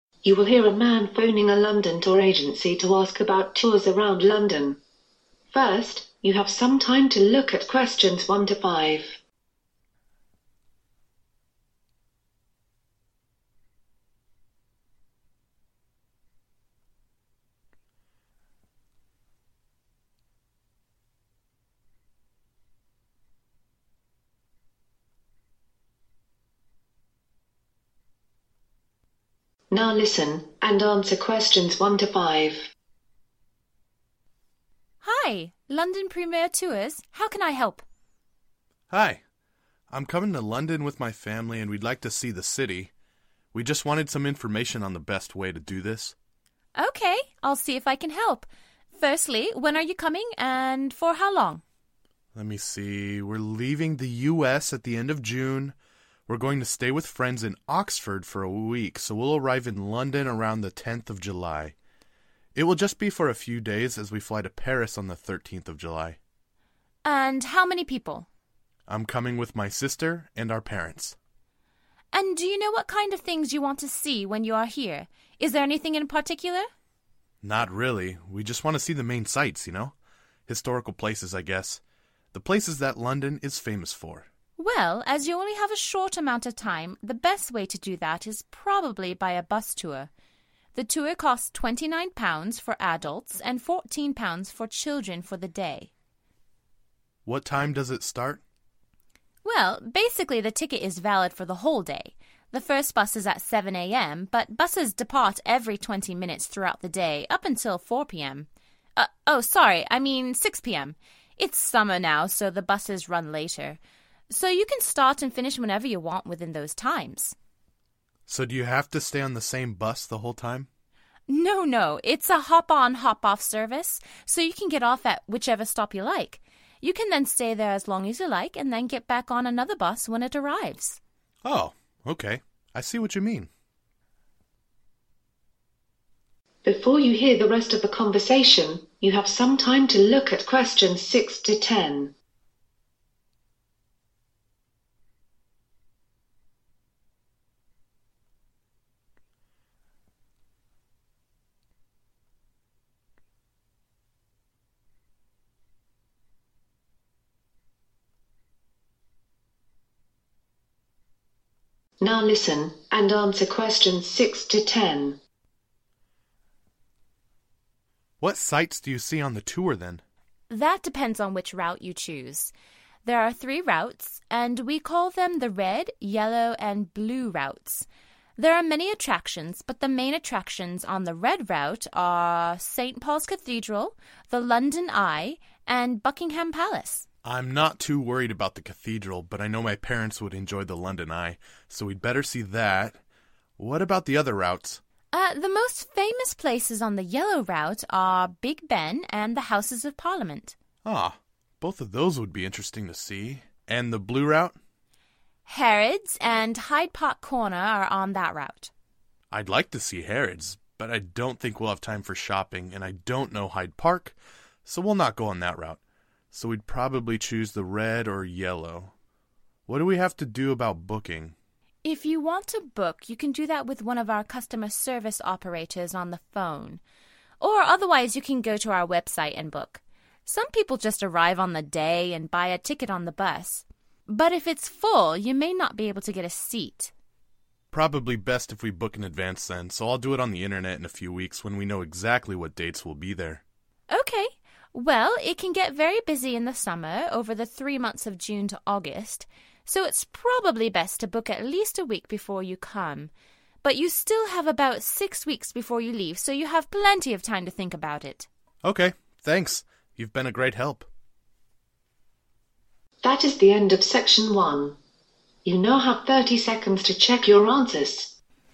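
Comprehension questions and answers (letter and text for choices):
For each Answer write NO MORE THAN ONE WORD AND / OR A NUMBER.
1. They will be coming to London on (1).............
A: 10 July

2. He's going with his sister and his (2)...........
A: parents

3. The cost is (3) £ ..........for adults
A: 29

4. (4) £ ............for children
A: 14

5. Tours start at 7am and finish at (5)............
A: 6pm

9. How will the tourist buy the tickets?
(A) By phone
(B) Online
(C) On the bus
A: (B) Online

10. How long before he leaves should he buy his tickets?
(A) 1 week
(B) 6 weeks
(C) 3 months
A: (A) 1 week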